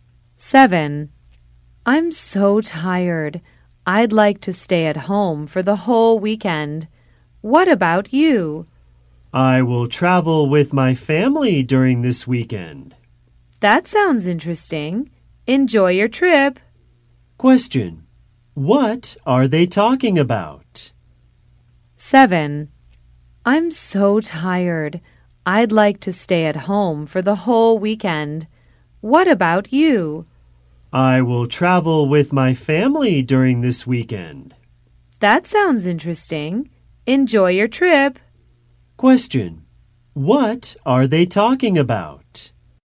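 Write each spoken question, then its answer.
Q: What are they talking about?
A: Their weekend plans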